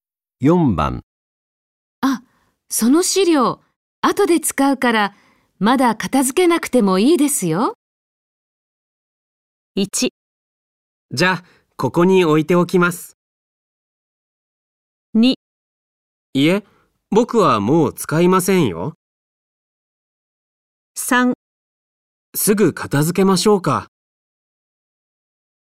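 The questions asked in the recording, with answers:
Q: あ、その資料、後で使うから、まだ片付けなくてもいいですよ。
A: 1: じゃあ、ここに置いておきます。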